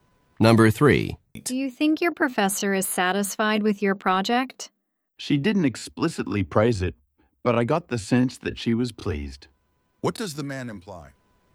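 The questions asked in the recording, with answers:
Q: What does the man imply?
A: The professor seemed pleased with the project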